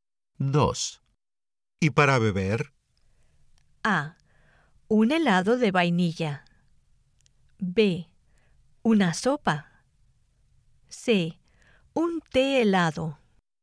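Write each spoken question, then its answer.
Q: ¿Y para beber?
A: C: Un té helado.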